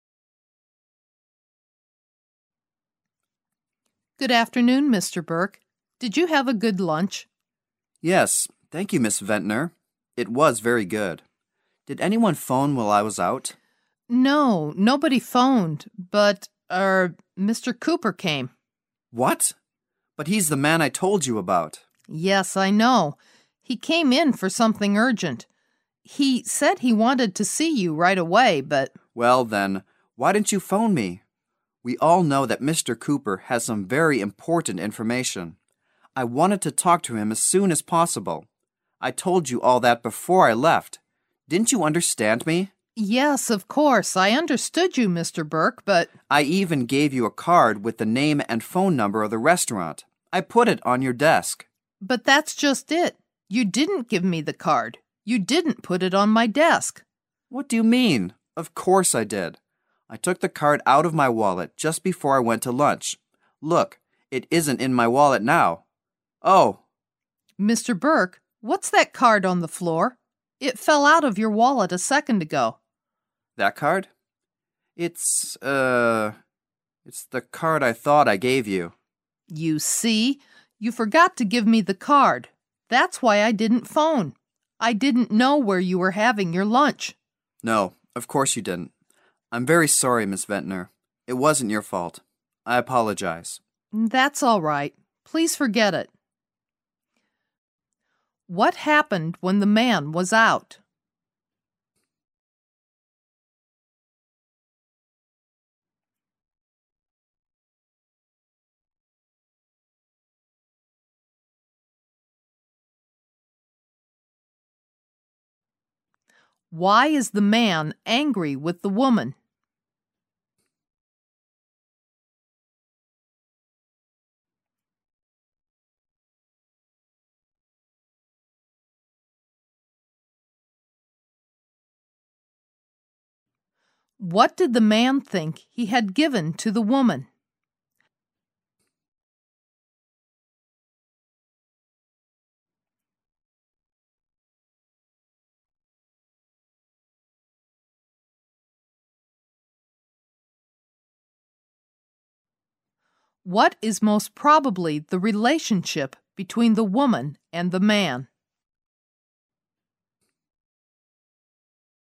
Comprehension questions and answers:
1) What happened when the man was out?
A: Someone came.

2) Why is the man angry with the woman?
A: She didn't phone him when Mr. Cooper came.

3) What did the man think he had given to the woman?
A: An information card of a restaurant.

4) What is most probably the relationship between the woman and the man?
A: The secretary and the boss.

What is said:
A B C D B [听力原文] W: Good afternoon, Mr. Burke. Did you have a good lunch? M: Yes, thank you, Miss Ventner. It was very good. Did anyone phone while I was out? W: No, nobody phoned, but.., er... Mr. Cooper came. M: What? But he's the man I told you about! W: Yes, I know. He came in for something urgent. He said he wanted to see you right away, but... M: Well, then, why didn't you phone me? We all know that Mr. Cooper has some very important information. I wanted to talk to him as soon as possible. I told you all that before I left. Didn't you understand me? W: Yes, of course, I understood you, Mr. Burke, but... M: I even gave you a card with the name and phone number of the restaurant! I put it on your desk. W: But that's just it! You didn't give me the card. You didn't put it on my desk! M: What do you mean? I took the card out of my wallet just before I went to lunch! Look! It isn't in my wallet now! OH! W: Mr. Burke, what's that card on the floor? It fell out of your wallet a second ago. M: That card? It's... it's the card I thought I gave you. W: You see! You forgot to give me the card! That's why I didn't phone. I didn't know where you were having your lunch. M: No, of course you didn't. I'm very sorry, Miss Ventner. It wasn't your fault. I apologize. W: That's all right. Please forget it.

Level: 大学英语四级